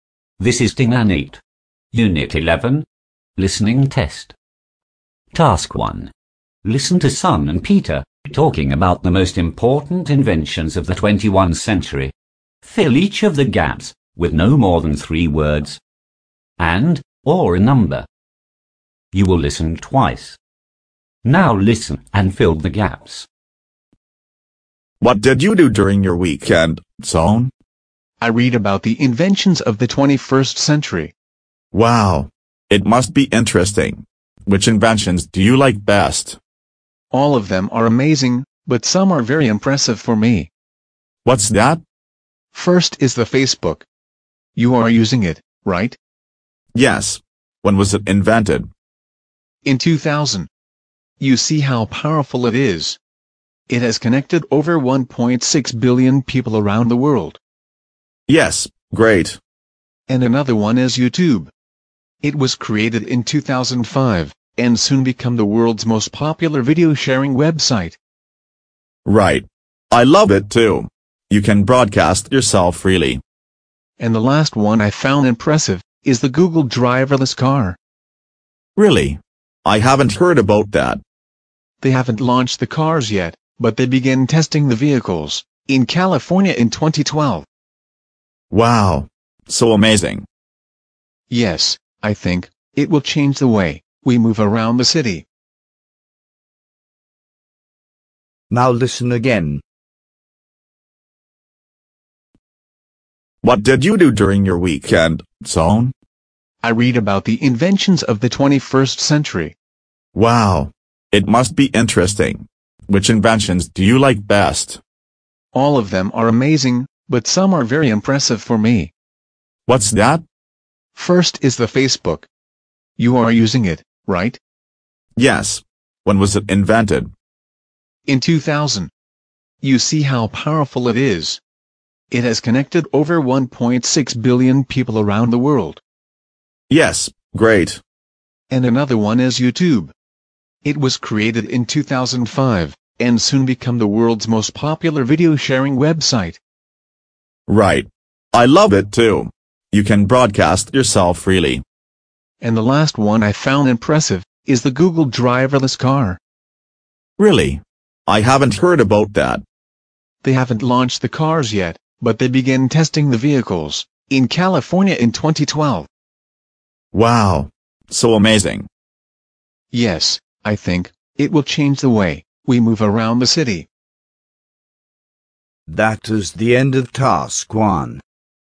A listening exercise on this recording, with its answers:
1. Listen to Son and Peter talking about the most important inventions of the 21th century. Fill each of the gaps with no more than THREE words and/or a number. You will listen TWICE.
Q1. Year of invention (1) ______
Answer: 2000

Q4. World most popular (4) _______.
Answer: video-sharing website

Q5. Change the way people (5) ______ the city.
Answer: move around

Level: lớp 8